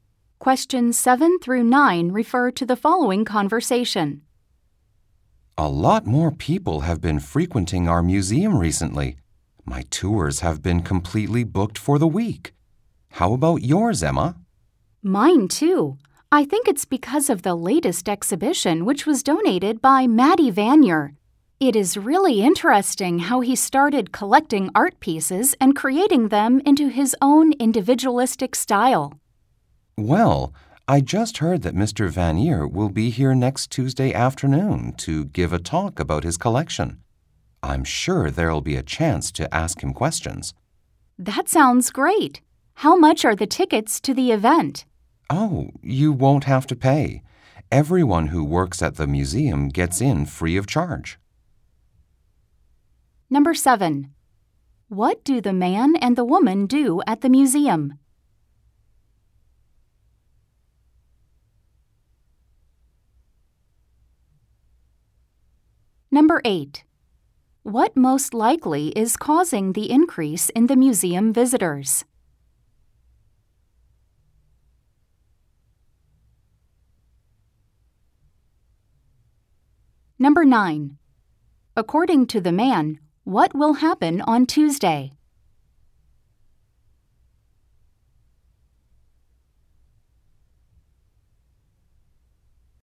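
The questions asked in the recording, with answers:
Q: What do the man and the woman do at the museum?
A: They are tour guides

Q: What most likely is causing the increase in the museum visitors?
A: The latest exhibition donated by Maddie Vanier

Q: According to the man, what will happen on Tuesday?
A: Mr. Vanier will give a talk about his collection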